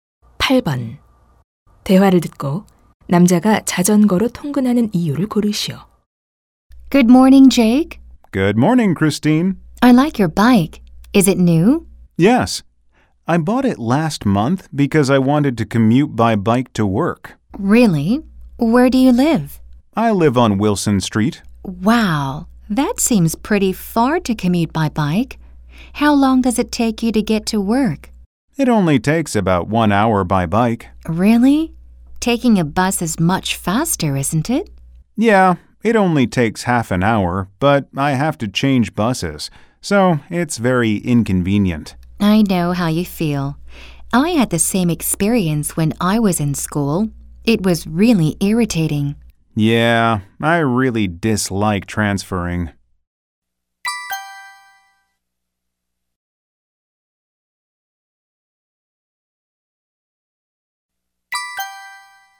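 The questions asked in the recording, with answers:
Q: 대화를 듣고 남자가 자전거로 통근하는 이유를 고르시오.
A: 버스 환승이 불편해서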